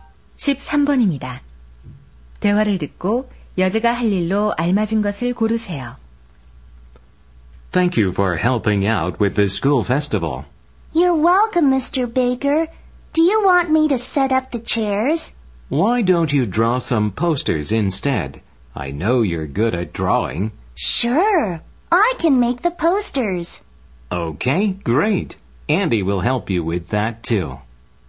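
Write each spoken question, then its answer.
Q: 대화를 듣고 여자가 할 일로 알맞은 것을 고르세요.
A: 포스터 그리기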